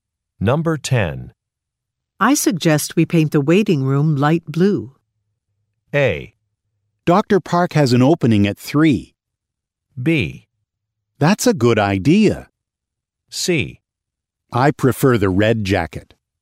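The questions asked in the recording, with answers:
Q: I suggest we paint the waiting room light blue.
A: B: That's a good idea.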